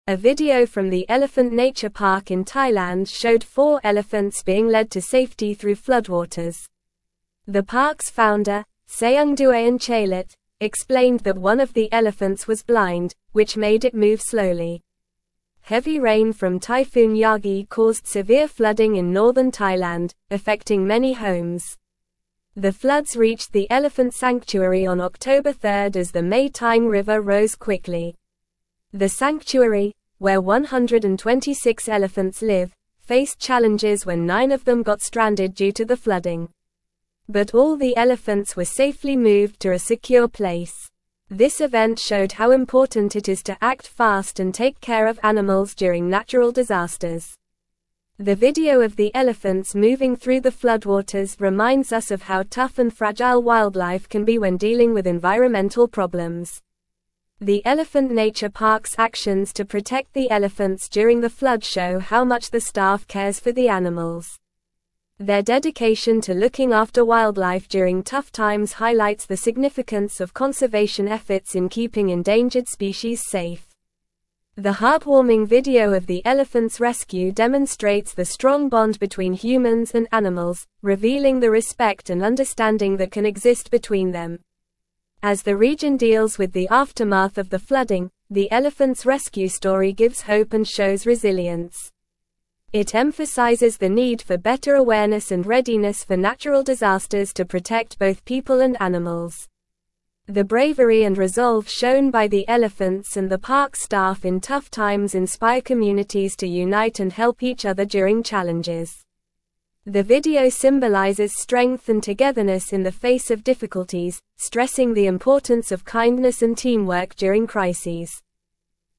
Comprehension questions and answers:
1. A video from the (1)______ Nature Park in Thailand showed four (2)______ being led to safety through floodwaters.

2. A video from the (1)______ Nature Park in Thailand showed four (2)______ being led to safety through floodwaters.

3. The park's founder, Saengduean Chailert, explained that one of the elephants was (3)______, which made it move slowly.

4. Heavy rain from Typhoon Yagi caused (4)______ flooding in northern Thailand, affecting many homes.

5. The sanctuary, where 126 elephants live, faced (5)______ when nine of them got stranded due to the (6)______.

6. The sanctuary, where 126 elephants live, faced (5)______ when nine of them got stranded due to the (6)______.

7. But all the elephants were safely moved to a secure (7)______.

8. This event showed how important it is to act fast and take care of (8)______ during natural disasters.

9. The Elephant Nature Park's actions to protect the elephants during the (9)______ show how much the staff cares for the animals.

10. Their dedication to (10)______ after wildlife during tough times highlights the significance of conservation efforts in keeping endangered species safe.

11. The heartwarming video of the elephants' rescue (11)______ the strong bond between humans and animals, revealing the respect and understanding that can (12)______ between them.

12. The heartwarming video of the elephants' rescue (11)______ the strong bond between humans and animals, revealing the respect and understanding that can (12)______ between them.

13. As the region deals with the aftermath of the flooding, the elephants' (13)______ story gives hope and shows (14)______.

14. As the region deals with the aftermath of the flooding, the elephants' (13)______ story gives hope and shows (14)______.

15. The bravery and resolve shown by the elephants and the park staff in (15)______ times inspire communities to unite and help each other during challenges.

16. The (16)______ symbolizes strength and togetherness in the face of difficulties, stressing the importance of kindness and teamwork during crises.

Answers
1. Elephant
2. elephants
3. blind
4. severe
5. challenges
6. flooding
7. place
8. animals
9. flood
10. looking
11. demonstrates
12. exist
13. rescue
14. resilience
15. tough
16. video

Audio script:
A video from the Elephant Nature Park in Thailand showed four elephants being led to safety through floodwaters. The park's founder, Saengduean Chailert, explained that one of the elephants was blind, which made it move slowly. Heavy rain from Typhoon Yagi caused severe flooding in northern Thailand, affecting many homes. The floods reached the elephant sanctuary on October 3rd as the Mae Taeng River rose quickly.
The sanctuary, where 126 elephants live, faced challenges when nine of them got stranded due to the flooding. But all the elephants were safely moved to a secure place. This event showed how important it is to act fast and take care of animals during natural disasters. The video of the elephants moving through the floodwaters reminds us of how tough and fragile wildlife can be when dealing with environmental problems.
The Elephant Nature Park's actions to protect the elephants during the flood show how much the staff cares for the animals. Their dedication to looking after wildlife during tough times highlights the significance of conservation efforts in keeping endangered species safe. The heartwarming video of the elephants' rescue demonstrates the strong bond between humans and animals, revealing the respect and understanding that can exist between them.
As the region deals with the aftermath of the flooding, the elephants' rescue story gives hope and shows resilience. It emphasizes the need for better awareness and readiness for natural disasters to protect both people and animals. The bravery and resolve shown by the elephants and the park staff in tough times inspire communities to unite and help each other during challenges. The video symbolizes strength and togetherness in the face of difficulties, stressing the importance of kindness and teamwork during crises.

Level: Level 3